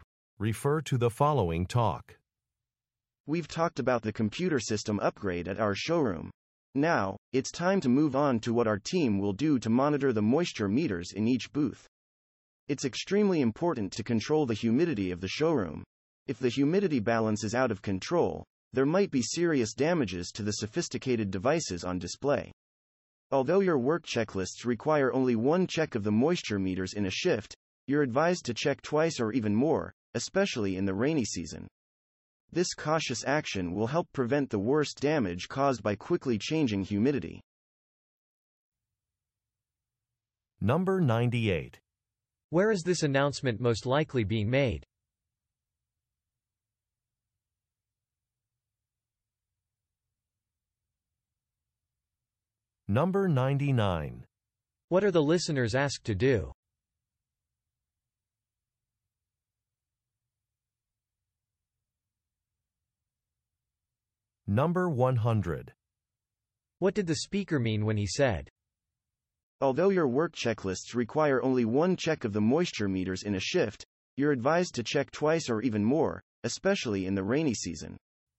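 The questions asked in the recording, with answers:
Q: Where is this announcement most likely being made?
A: At a staff meeting at a showroom

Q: What are the listeners asked to do?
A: Check the moisture meters in each booth more than once per shift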